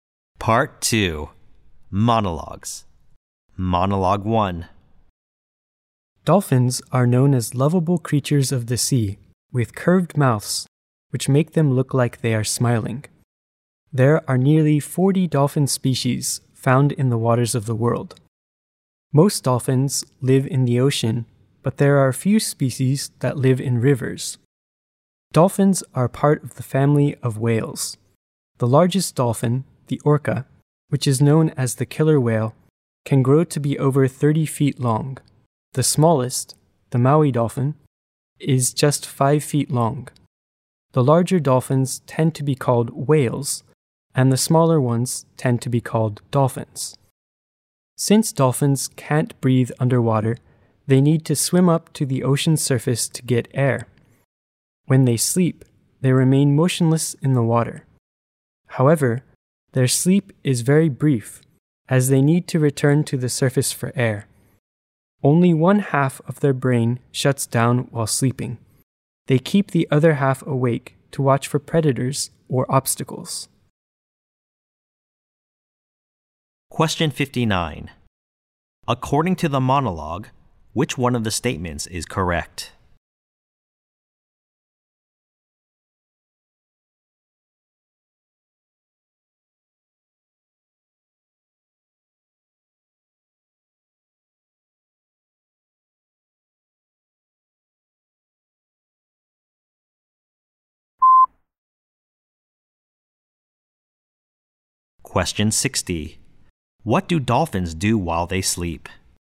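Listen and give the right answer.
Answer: They stay motionless with half of the brain awake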